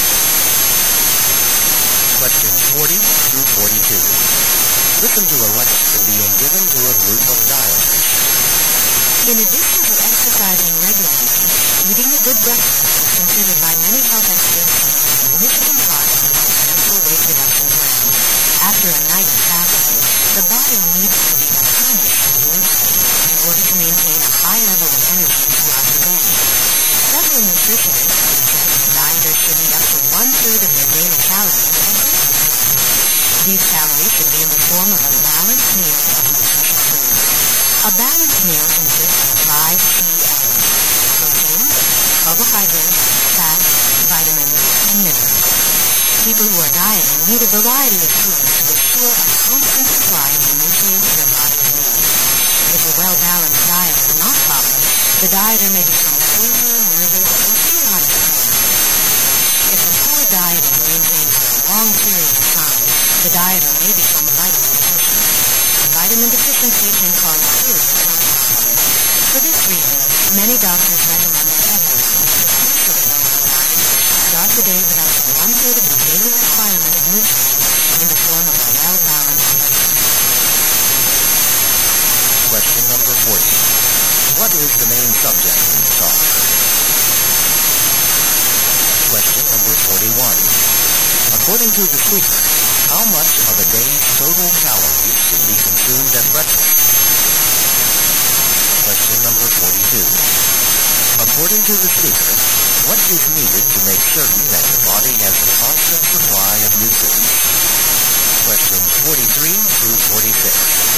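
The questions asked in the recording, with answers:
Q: What is the main subject in the talk?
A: Why a good breakfast matters for dieters

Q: According to the speaker, what is needed to make certain that the body has a constant supply of nutrients?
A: A variety of foods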